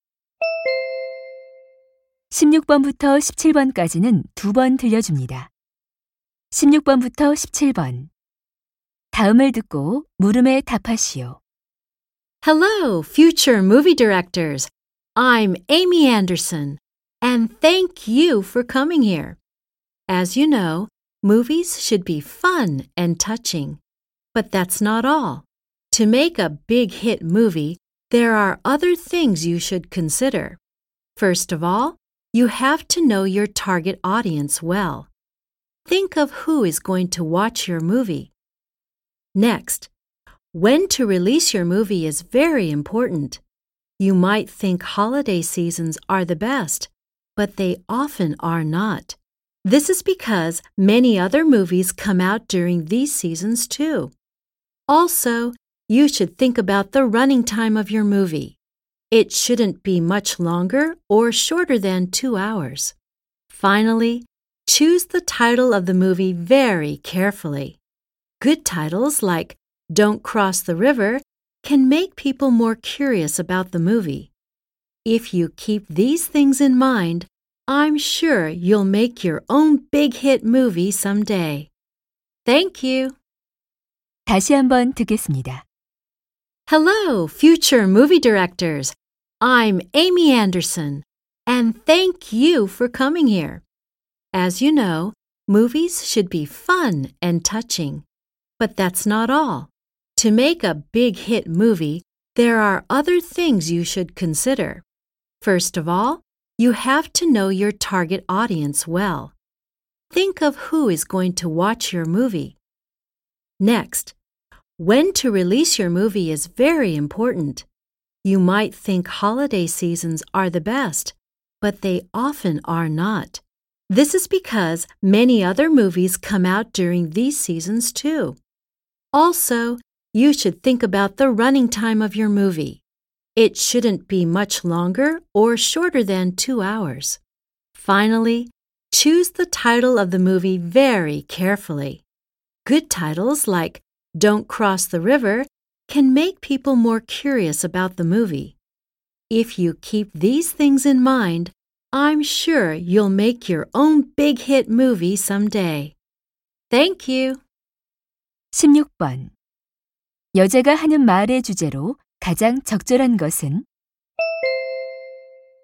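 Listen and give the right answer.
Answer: 흥행 영화를 만들기 위해 고려해야 할 사항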